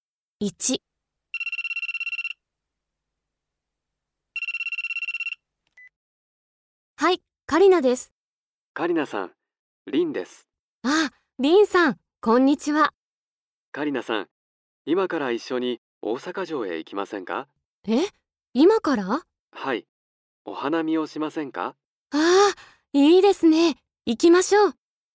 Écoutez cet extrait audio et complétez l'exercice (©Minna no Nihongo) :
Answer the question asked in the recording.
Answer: f. お花見をします

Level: MODULE 4 : Extension JLPT5